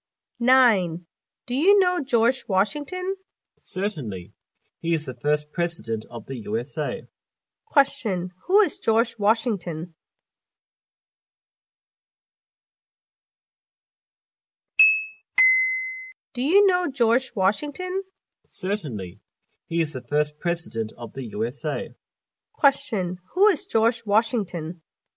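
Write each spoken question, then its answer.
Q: Who is George Washington?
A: The first president of the USA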